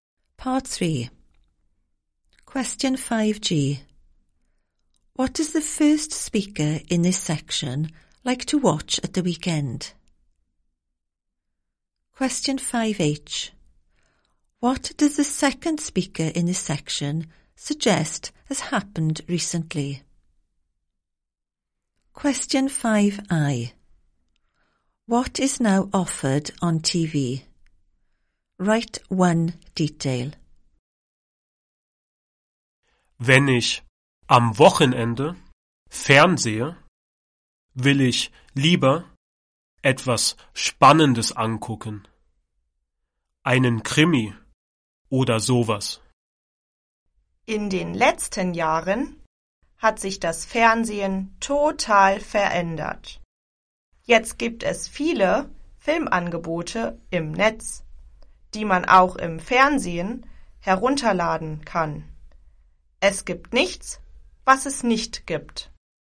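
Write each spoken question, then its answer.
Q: What does the first speaker in this section like to watch at the weekend?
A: Something exciting, like a crime thriller

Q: What does the second speaker in this section suggest has happened recently?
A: TV has changed totally

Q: What is now offered on TV?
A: Many films online that can be downloaded on TV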